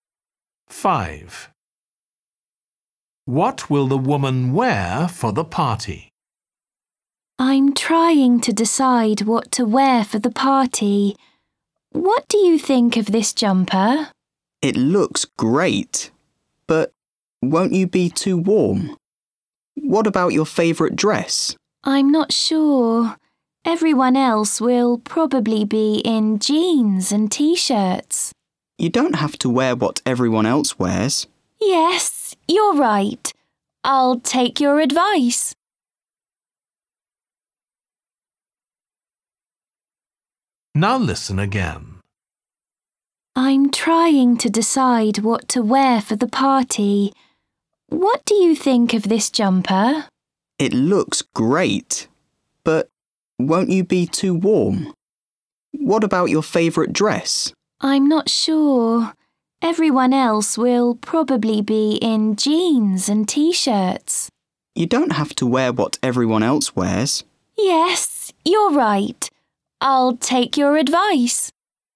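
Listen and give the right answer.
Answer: her favourite dress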